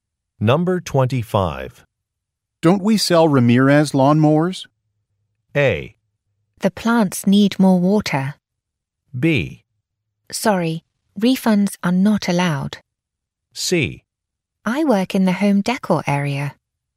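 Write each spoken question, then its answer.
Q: Don't we sell Ramirez lawnmowers?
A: C: I work in the home decor area.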